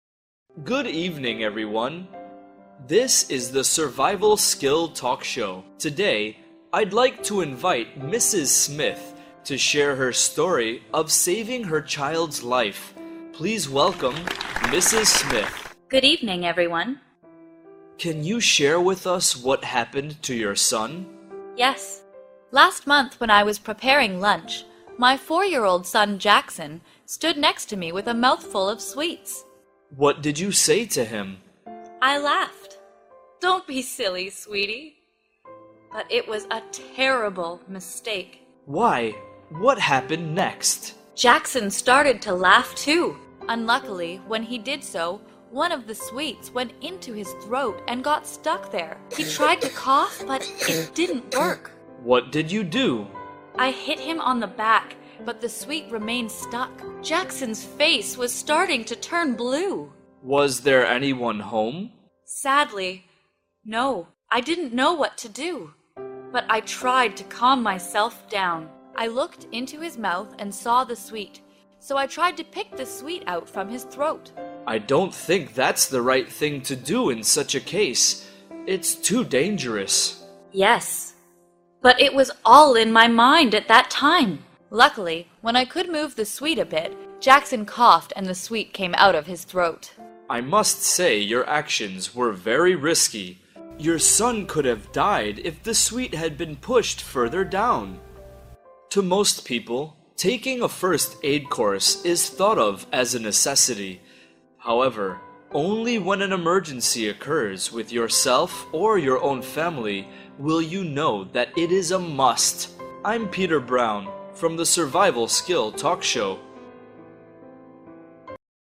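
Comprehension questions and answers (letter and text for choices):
Task: Choose the correct answer.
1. What caused Jackson's accident?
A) He was eating sweets while laughing.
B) He fell down the stairs.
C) He swallowed food too quickly.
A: A) He was eating sweets while laughing.

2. What did his mother do first to help him?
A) Called the doctor.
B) Hit him on the back.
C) Tried to pick the sweet out.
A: B) Hit him on the back.

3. What lesson can be learned from this story?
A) Always call for help.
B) First aid is an important skill everyone should learn.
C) Never eat sweets.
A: B) First aid is an important skill everyone should learn.

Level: lớp 8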